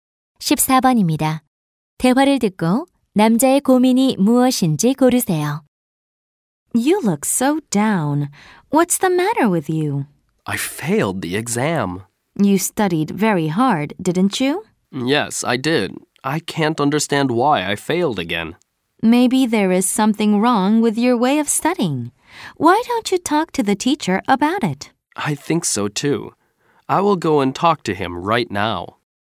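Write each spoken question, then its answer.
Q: 대화를 듣고 남자의 고민이 무엇인지 고르세요.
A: 열심히 공부했는데 시험에 떨어짐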